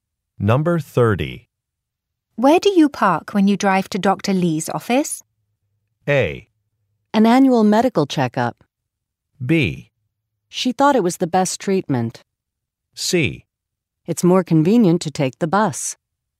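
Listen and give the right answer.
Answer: C: It's more convenient to take the bus.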